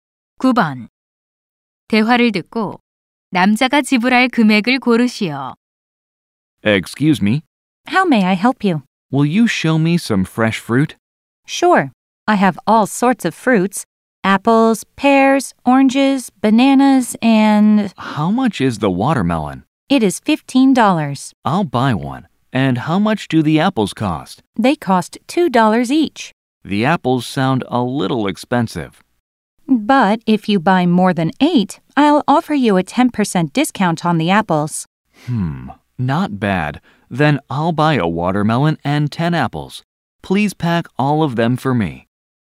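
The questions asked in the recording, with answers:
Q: 대화를 듣고 남자가 지불할 금액을 고르시오.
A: 33달러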